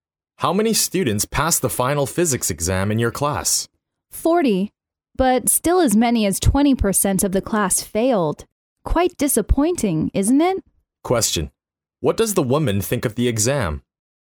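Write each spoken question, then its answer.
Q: What does the woman think of the exam?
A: The results were disappointing because 20% of the class failed.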